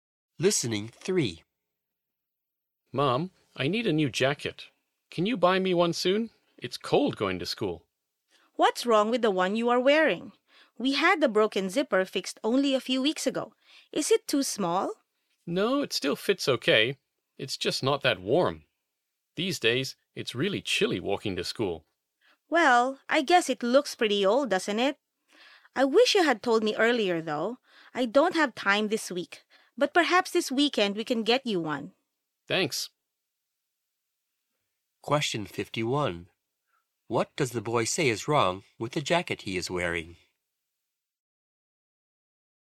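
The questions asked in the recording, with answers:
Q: What does the boy say is wrong with the jacket he is wearing?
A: It is not warm enough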